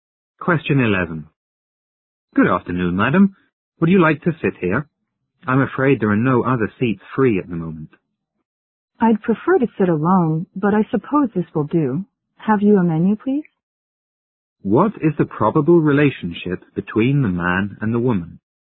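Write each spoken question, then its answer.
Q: What is the probable relationship between the man and the woman?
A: Waiter and customer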